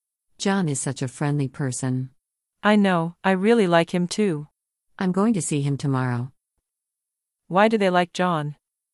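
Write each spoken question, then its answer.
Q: Why do they like John?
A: He is friendly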